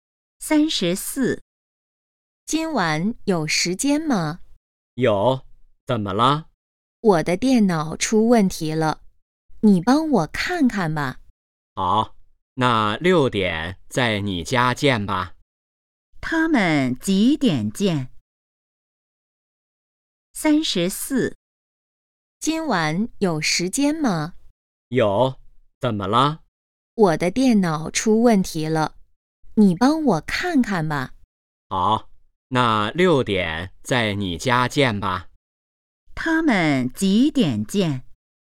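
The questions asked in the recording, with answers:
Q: 他们几点见?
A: 6点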